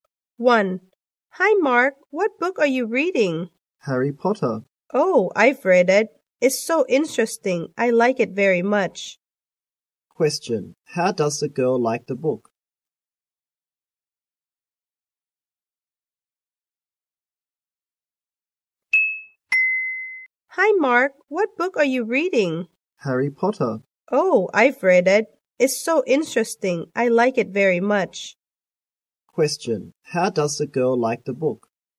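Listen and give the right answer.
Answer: She likes it very much; it's interesting.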